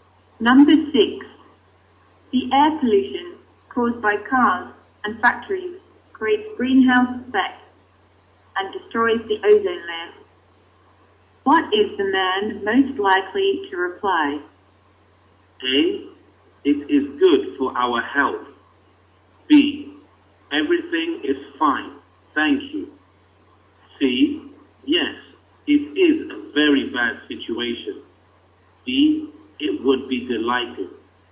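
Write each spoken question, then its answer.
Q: What is the man most likely to reply?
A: C: Yes, it is a very bad situation.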